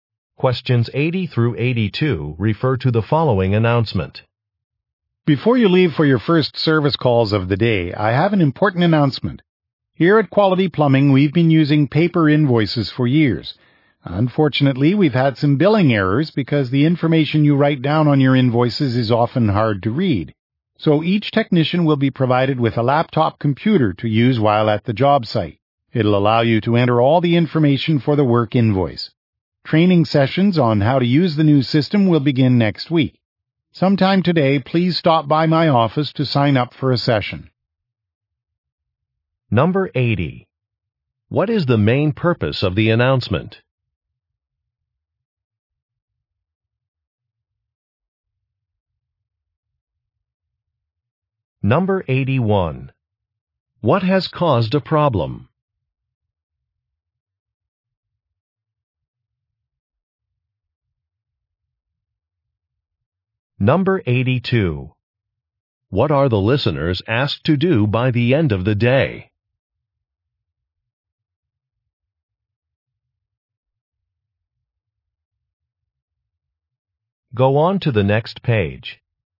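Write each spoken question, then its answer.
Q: What is the main purpose of the announcement?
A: To introduce laptops for entering invoices

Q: What has caused a problem?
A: Handwritten invoices are hard to read

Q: What are the listeners asked to do by the end of the day?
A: Sign up for a training session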